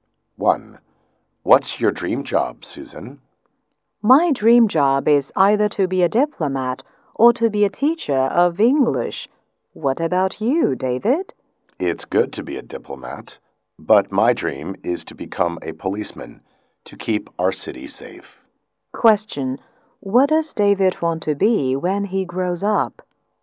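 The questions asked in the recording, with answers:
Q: What does David want to be when he grows up?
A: A policeman.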